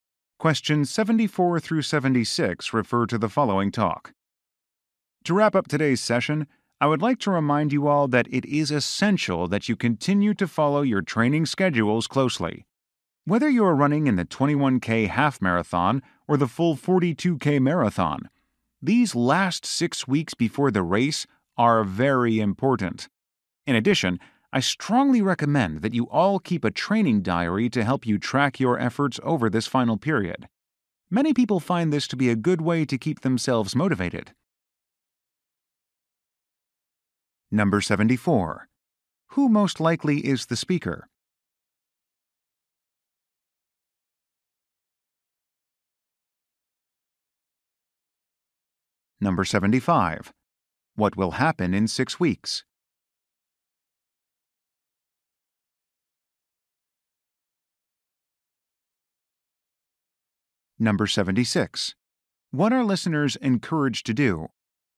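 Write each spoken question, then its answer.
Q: Who most likely is the speaker?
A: A running coach/trainer

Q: What will happen in 6 weeks?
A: A marathon race will be held

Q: What are listeners encouraged to do?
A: Keep a training diary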